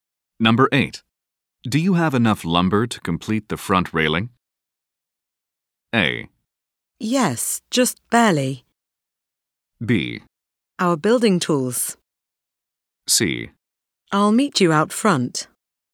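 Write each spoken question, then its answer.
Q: Do you have enough lumber to complete the front railing?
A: A: Yes, just barely.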